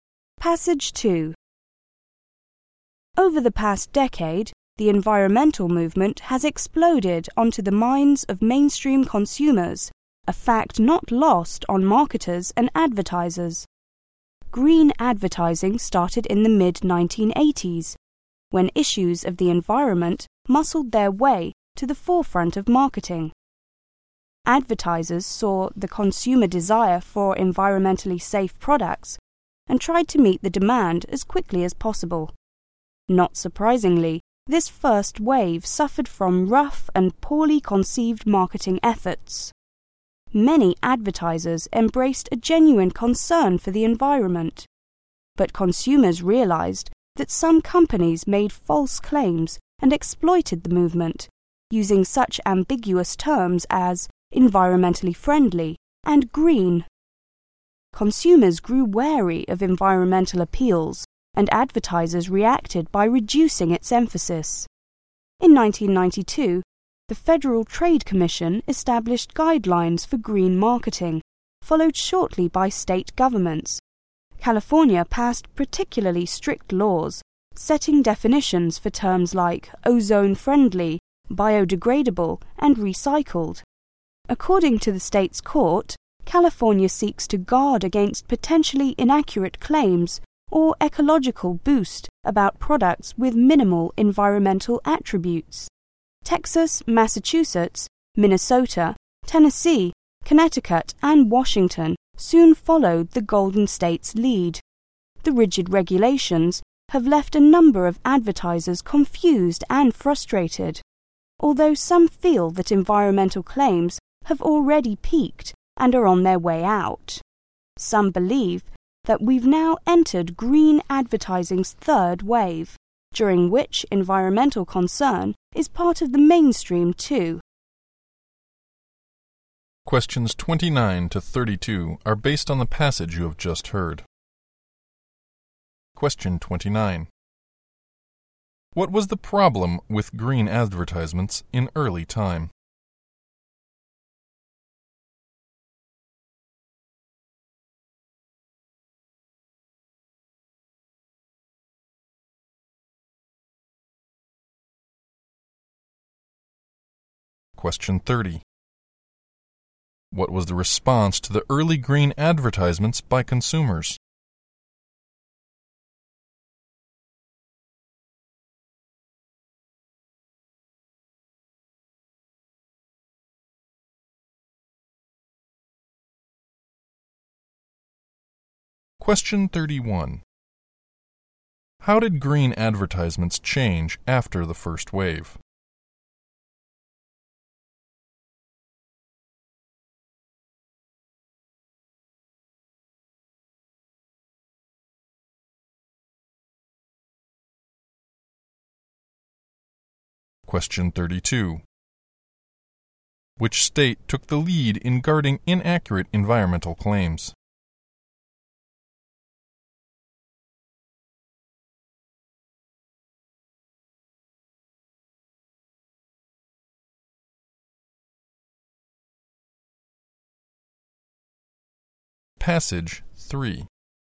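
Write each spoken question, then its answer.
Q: What was the problem with green advertisements in early time?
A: They were rough and poorly conceived, and some made false claims

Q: What was the response to the early green advertisements by consumers?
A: Consumers grew wary of them

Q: How did green advertisements change after the first wave?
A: Advertisers put less emphasis on environmental appeals

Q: Which state took the lead in guarding inaccurate environmental claims?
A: California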